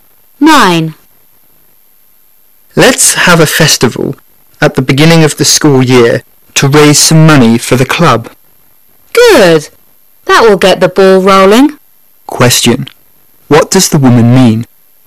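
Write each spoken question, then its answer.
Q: What does the woman mean?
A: The festival is a good way to get things started.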